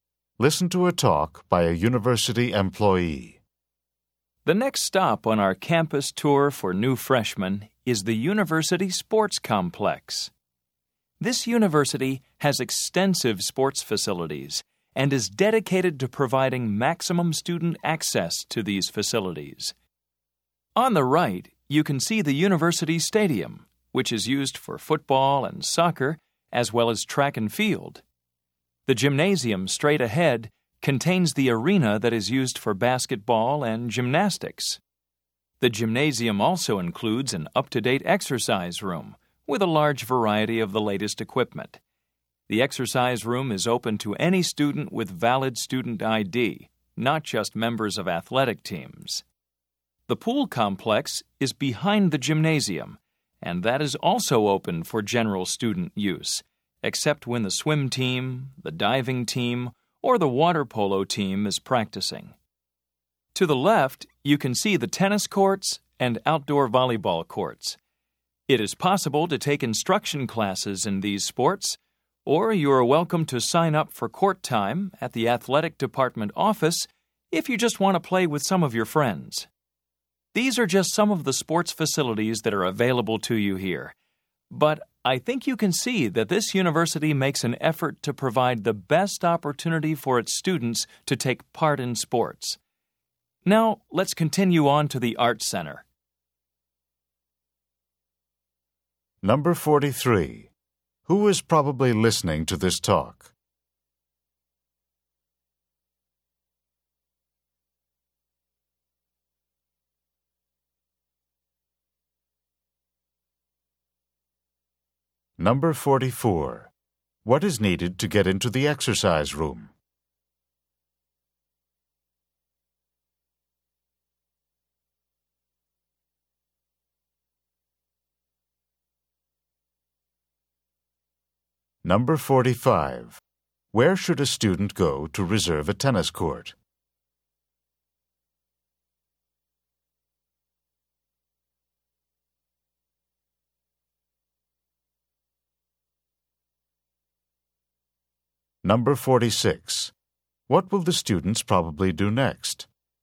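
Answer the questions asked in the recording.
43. New freshmen on a campus tour
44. A valid student ID
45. The athletic department office
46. Go on to the Art Center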